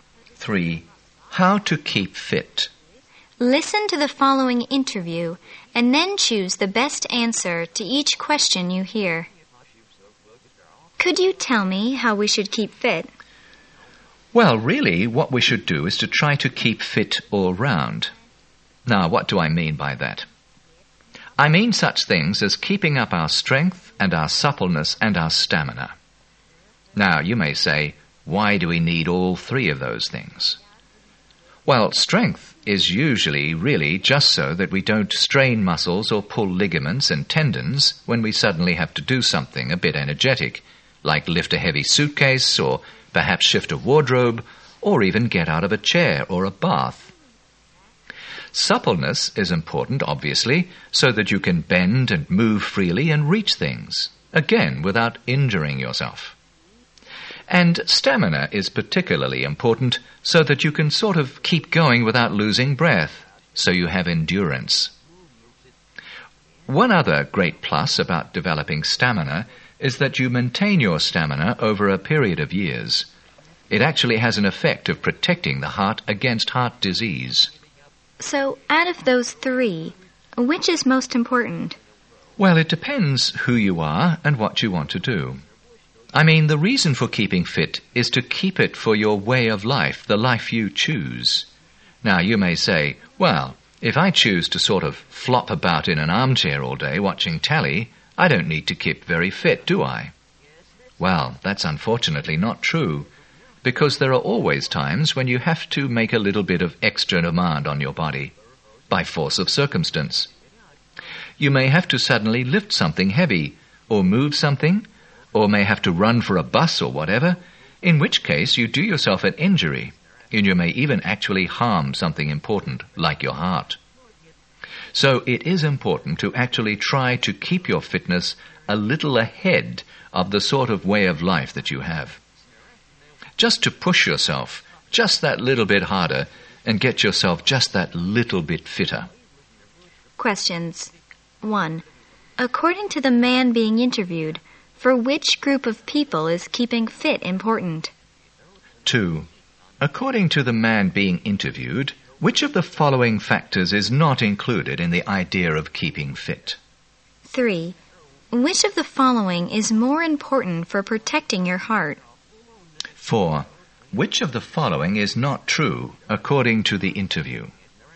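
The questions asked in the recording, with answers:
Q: Which of the following is more important for protecting your heart?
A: Stamina.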